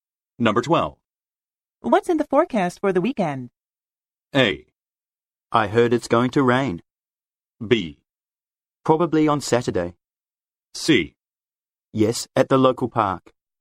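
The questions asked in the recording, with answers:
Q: What's in the forecast for the weekend?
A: A: I heard it's going to rain.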